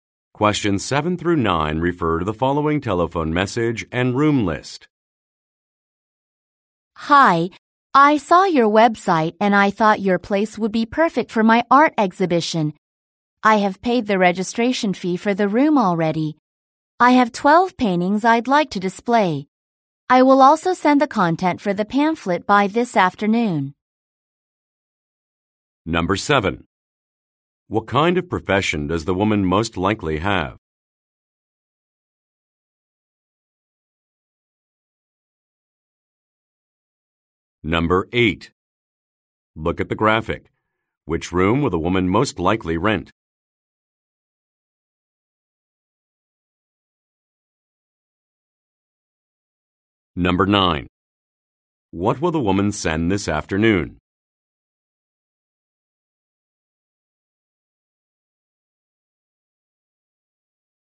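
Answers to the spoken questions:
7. Artist
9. The content for the pamphlet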